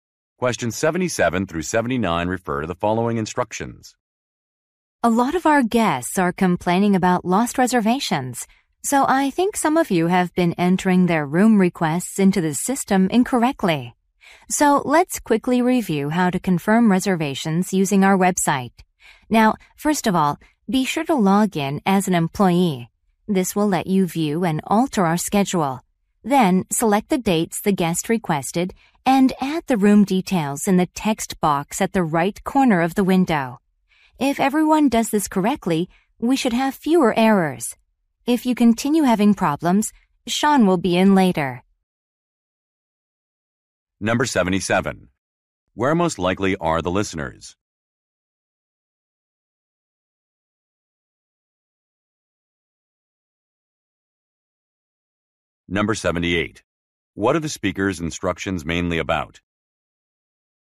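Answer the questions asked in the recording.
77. At a hotel
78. How to confirm reservations on the website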